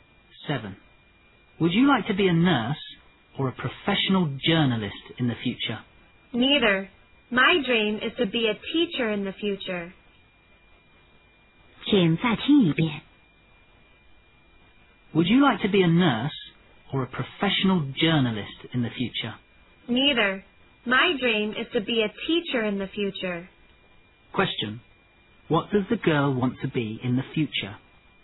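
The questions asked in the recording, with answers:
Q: What does the girl want to be in the future?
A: A teacher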